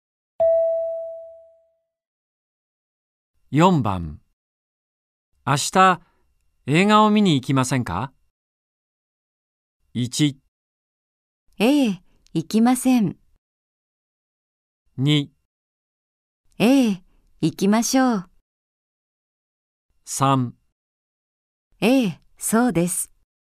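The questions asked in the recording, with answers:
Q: 明日映画を見に行きませんか。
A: 2: ええ、行きましょう。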